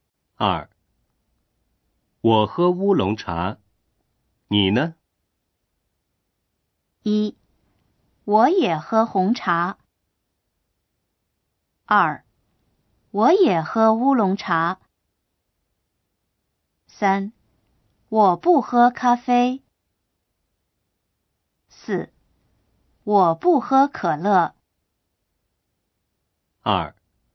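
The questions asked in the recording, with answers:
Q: 我喝乌龙茶,你呢?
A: 2: 我也喝乌龙茶。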